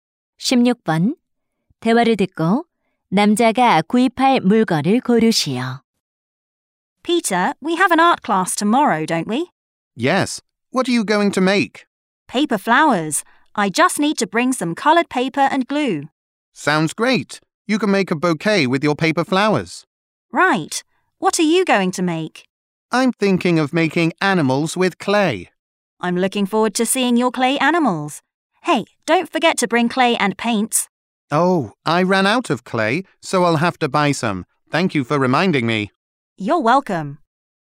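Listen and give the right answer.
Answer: 찰흙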